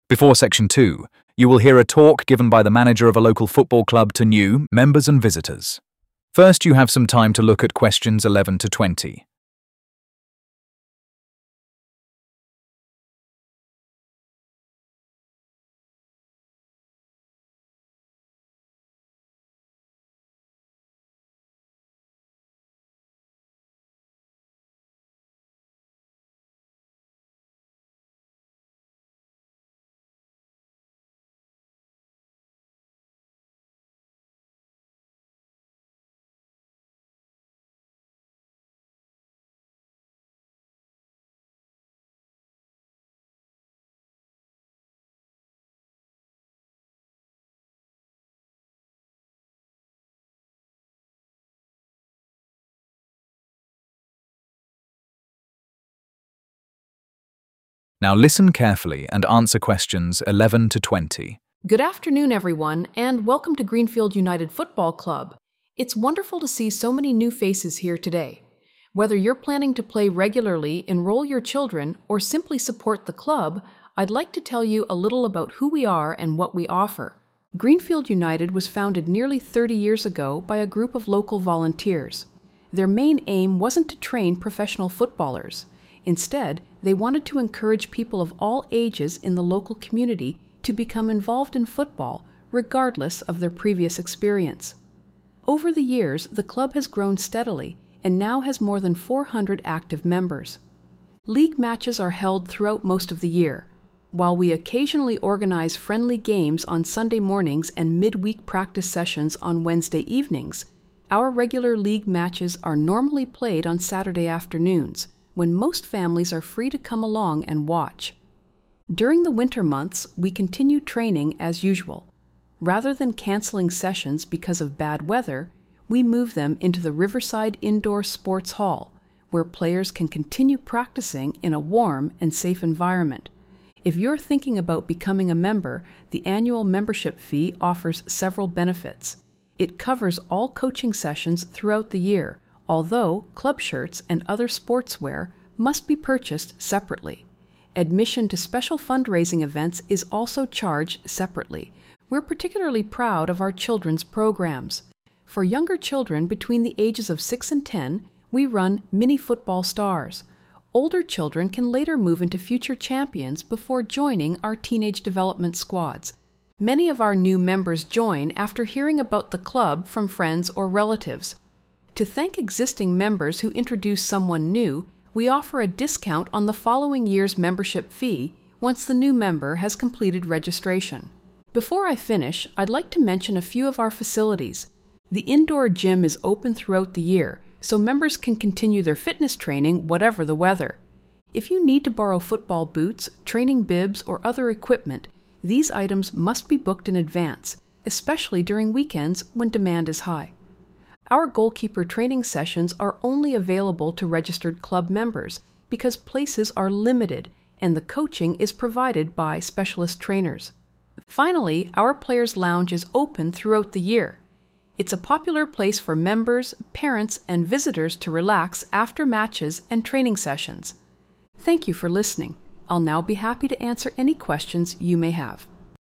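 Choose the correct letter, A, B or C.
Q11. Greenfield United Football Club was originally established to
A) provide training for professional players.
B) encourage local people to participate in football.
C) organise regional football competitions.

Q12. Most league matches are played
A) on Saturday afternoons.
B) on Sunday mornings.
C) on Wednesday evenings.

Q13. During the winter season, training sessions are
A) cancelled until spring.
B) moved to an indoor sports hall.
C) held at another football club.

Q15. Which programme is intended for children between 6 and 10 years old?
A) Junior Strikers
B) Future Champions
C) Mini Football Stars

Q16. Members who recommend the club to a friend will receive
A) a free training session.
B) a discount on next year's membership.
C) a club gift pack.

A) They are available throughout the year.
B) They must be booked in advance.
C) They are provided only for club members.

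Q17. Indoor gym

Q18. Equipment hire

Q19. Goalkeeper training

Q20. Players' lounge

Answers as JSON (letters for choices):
{"11": "B", "12": "A", "13": "B", "15": "C", "16": "B", "17": "A", "18": "B", "19": "C", "20": "A"}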